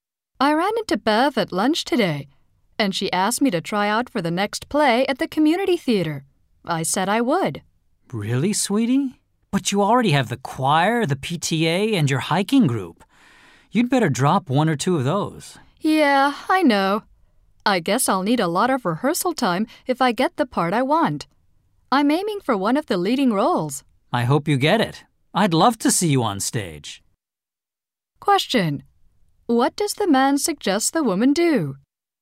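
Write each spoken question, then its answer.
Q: What does the man suggest the woman do?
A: Drop one or two of her other activities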